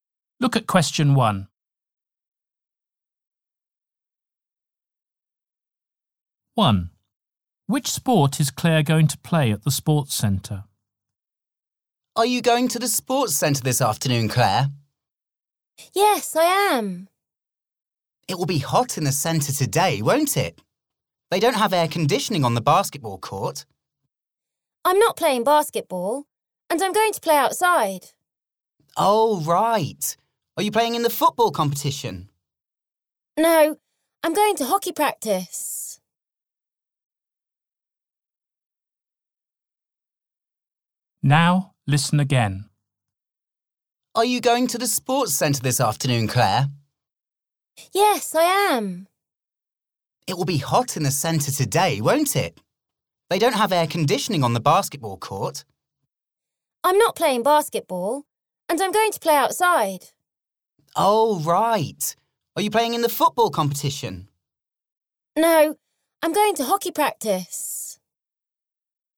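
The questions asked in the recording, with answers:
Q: Which sport is Claire going to play at the sports centre?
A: hockey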